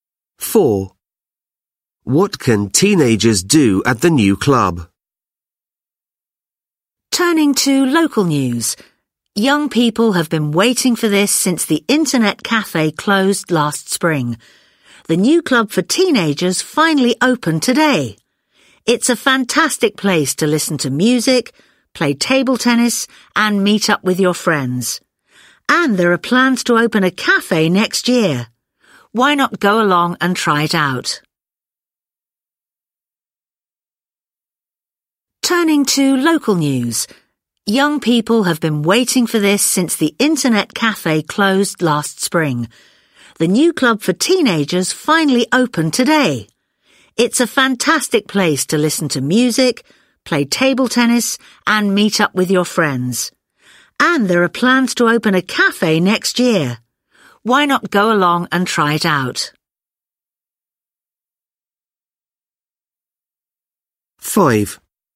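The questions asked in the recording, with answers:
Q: What can teenagers do at the new club?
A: Listen to music, play table tennis and meet friends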